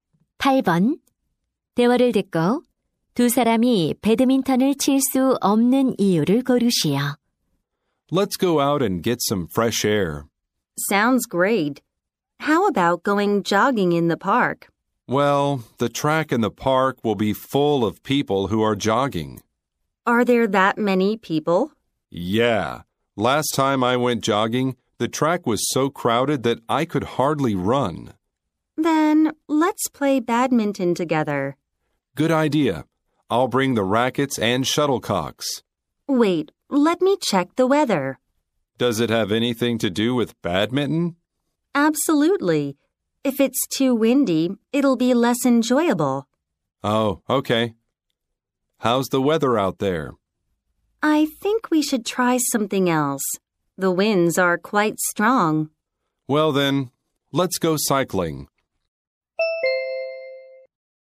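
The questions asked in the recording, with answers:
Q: 대화를 듣고 두 사람이 배드민턴을 칠 수 없는 이유를 고르시오.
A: 바람이 너무 강해서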